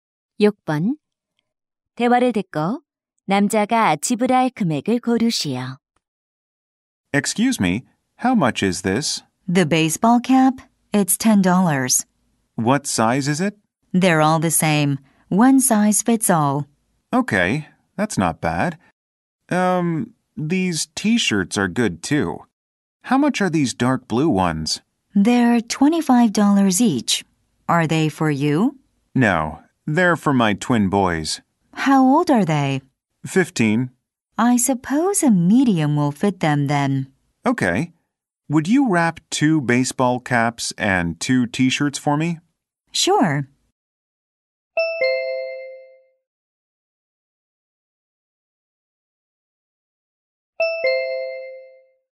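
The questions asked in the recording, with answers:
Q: 대화를 듣고 남자가 지불할 금액을 고르시오.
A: $70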